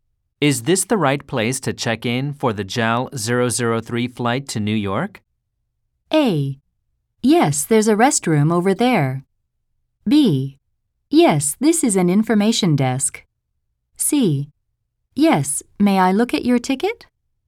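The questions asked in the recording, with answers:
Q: Is this the right place to check in for the JAL 003 flight to New York?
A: C: Yes, may I look at your ticket?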